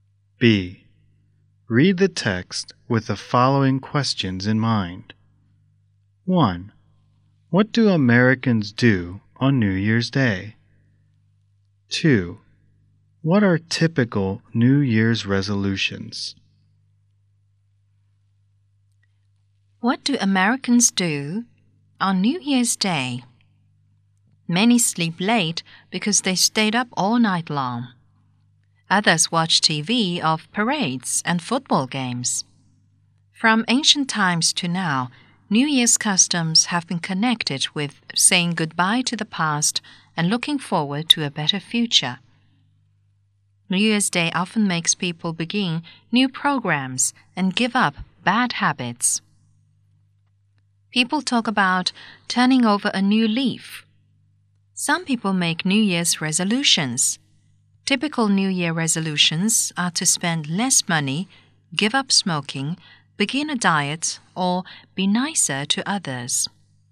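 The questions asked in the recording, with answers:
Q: What do Americans do on New Year's Day?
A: Many sleep late; others watch TV of parades and football games.

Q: What are typical New Year's resolutions?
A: To spend less money, give up smoking, begin a diet, or be nicer to others.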